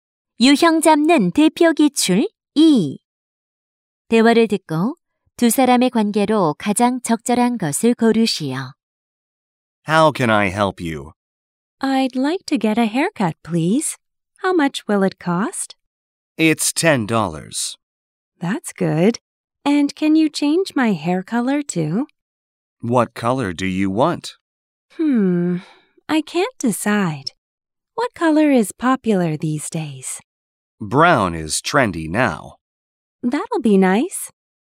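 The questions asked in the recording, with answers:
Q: 대화를 듣고 두 사람의 관계로 가장 적절한 것을 고르시오.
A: 미용사 - 손님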